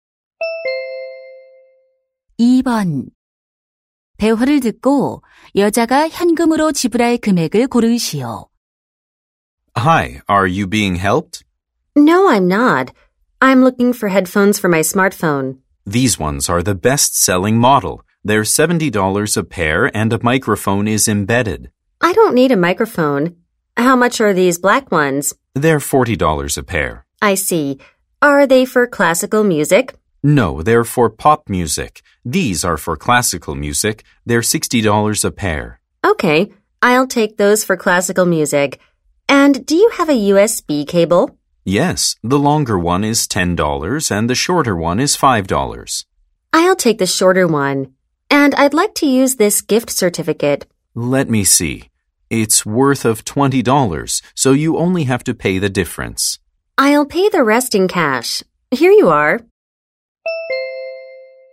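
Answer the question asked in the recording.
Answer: $45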